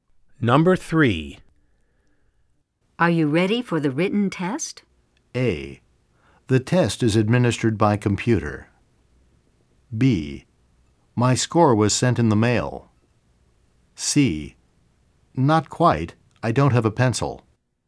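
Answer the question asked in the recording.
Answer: C: Not quite. I don't have a pencil.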